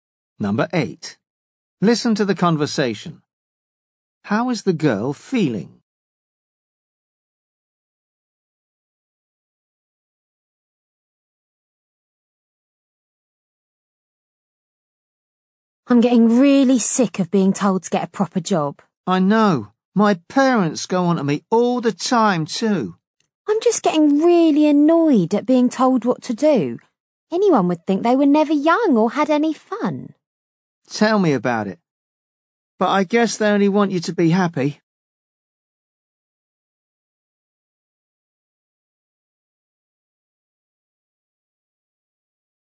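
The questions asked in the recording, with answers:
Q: How is the girl feeling?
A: Annoyed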